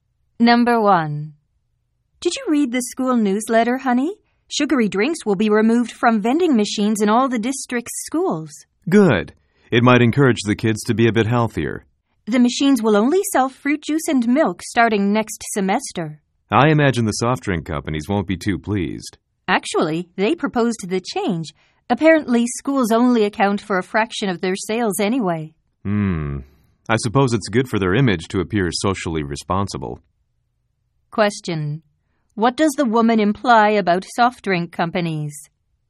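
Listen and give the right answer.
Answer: They supported the change mainly to improve their image by appearing socially responsible.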